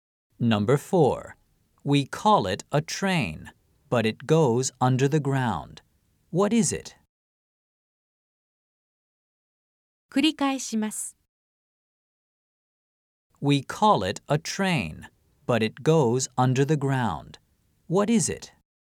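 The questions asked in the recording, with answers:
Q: What is it?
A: a subway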